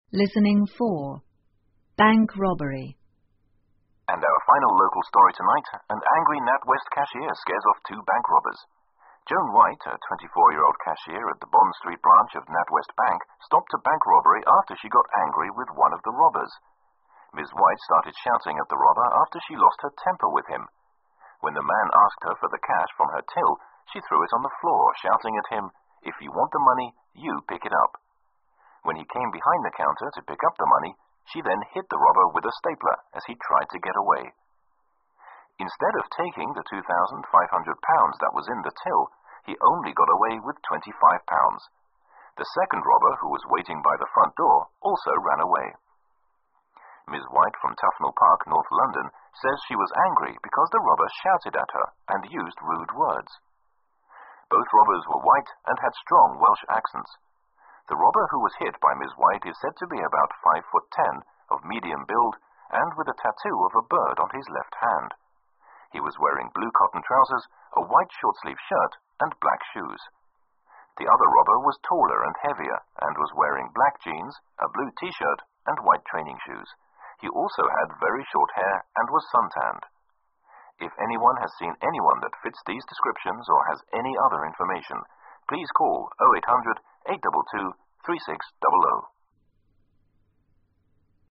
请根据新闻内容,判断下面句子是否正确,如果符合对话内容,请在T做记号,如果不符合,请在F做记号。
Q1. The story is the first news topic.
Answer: F

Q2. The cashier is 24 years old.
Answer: T

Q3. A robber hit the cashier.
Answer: F

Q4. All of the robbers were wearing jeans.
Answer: F

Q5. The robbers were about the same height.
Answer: F

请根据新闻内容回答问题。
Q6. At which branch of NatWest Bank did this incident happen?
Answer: The Bond Street branch.

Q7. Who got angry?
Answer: A cashier of the bank.

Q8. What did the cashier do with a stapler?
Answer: the hit the robber with it

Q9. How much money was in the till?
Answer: $2,500

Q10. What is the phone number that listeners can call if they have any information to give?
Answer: 0800-822-3600

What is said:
And our final local story tonight,an angry NatWest cashier scares off two bank robbers.
Joan White,a 24-year-old cashier at the Bond Street branch of NatWest Bank stopped a bank
robbery after she got angry with one of the robbers.
Ms White started shouting at the robber after she lost her temper with him.When the man asked
her for the cash from her till,she threw it on the floor shouting at him,"If you want the money,you
pick it up."When he came behind the counter to pick up the money,she then hit the robber with a
stapler as he tried to get away.
Instead of taking the £2,500 that was in the till,he only got away with £25.The second robber
who was waiting by the front door also ran away.
Ms White,from Thfnell Park,North London,says she was angry because the robber shouted at her
and used rude words.
Both robbers were white and had strong Welsh accents.The robber who was hit by Ms White is
said to be about 5'10,of medium build,and with a tattoo of a bird on his left hand.He was wearing
blue cotton trousers,a white short-sleeve shirt and black shoes.The other robber was taller and
heavier,and was wearing black jeans,a blue I-shirt and while training shoes.He also had very short
hair and was suntanned.
If anyone has seen anyone that fits these descriptions or has any other information,please call